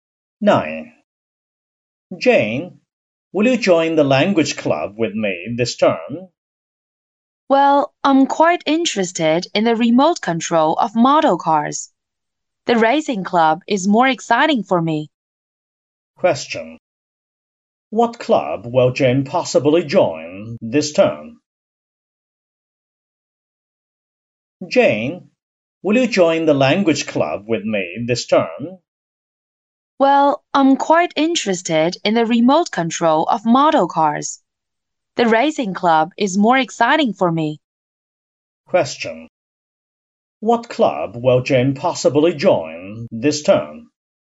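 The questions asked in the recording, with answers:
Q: What club will Jane possibly join this term?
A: The racing club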